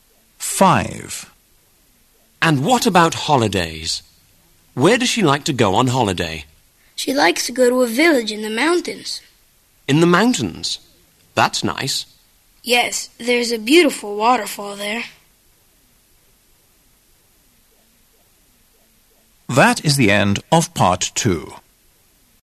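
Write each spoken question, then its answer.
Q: Where does she like to go on holiday?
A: A village in the mountains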